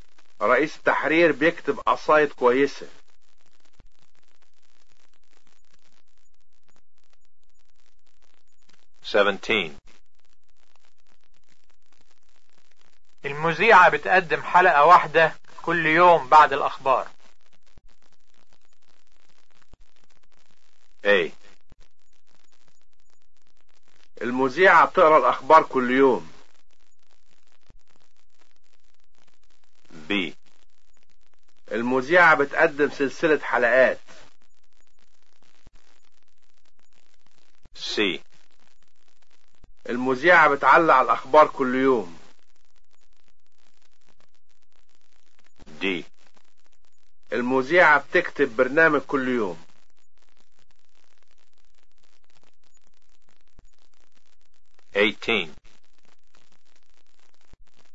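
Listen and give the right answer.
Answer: B: المذيعة بتقدم سلسلة حلقات.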